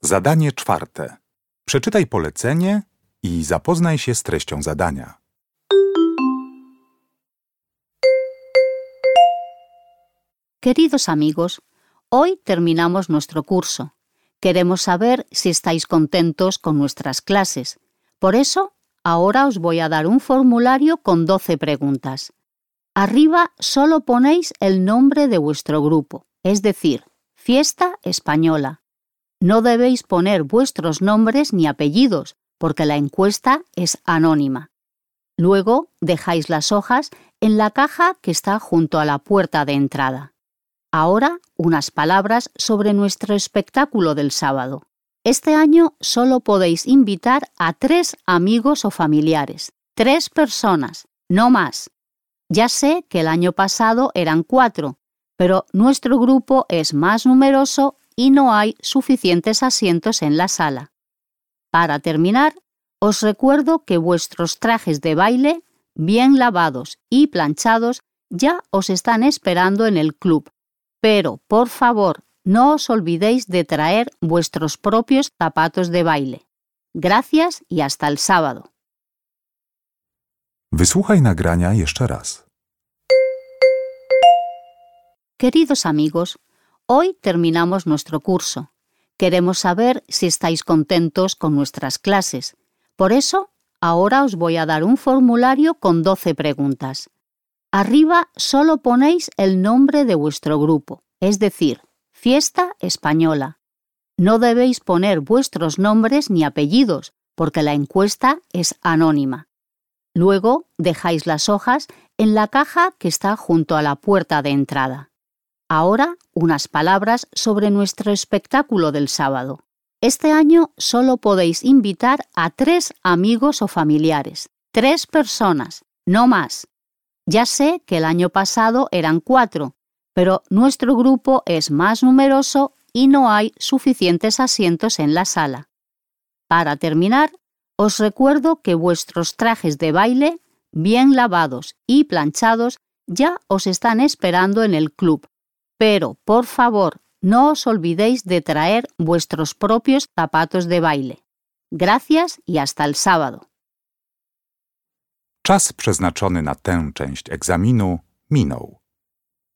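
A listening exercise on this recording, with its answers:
Uruchamiając odtwarzacz z oryginalnym nagraniem CKE usłyszysz dwukrotnie wypowiedź na temat zakończenia kursu tańca. Na podstawie informacji zawartych w nagraniu odpowiedz krótko na pytania 4.1.–4.3., tak aby jak najbardziej precyzyjnie oddać sens wysłuchanego tekstu. Na pytania należy odpowiedzieć w języku hiszpańskim.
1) ¿Qué nombre hay que poner en el formulario?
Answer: El nombre del grupo: Fiesta Española.

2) ¿A cuántas personas como máximo puede invitar cada participante del grupo?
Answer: A tres personas.

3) ¿Qué deben llevar los cursantes para el espectáculo?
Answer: Sus propios zapatos de baile.

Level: ósmoklasisty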